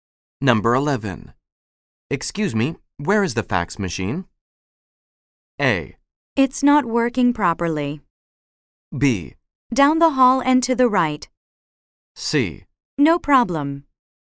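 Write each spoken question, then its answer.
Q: Excuse me, where is the fax machine?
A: B: Down the hall and to the right.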